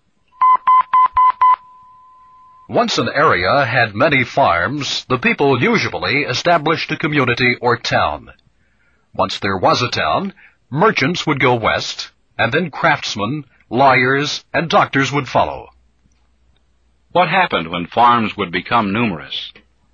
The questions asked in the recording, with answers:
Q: What happened when farms would become numerous?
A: A community or town would be established.